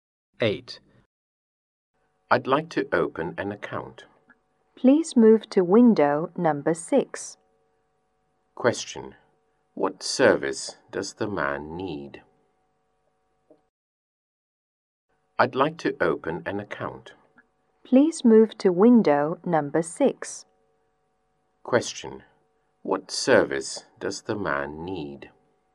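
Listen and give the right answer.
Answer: Opening an account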